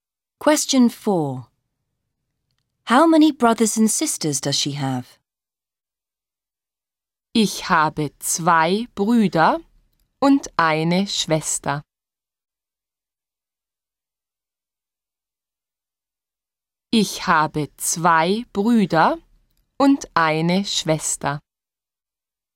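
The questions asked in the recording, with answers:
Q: How many brothers and sisters does she have?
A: Two brothers and one sister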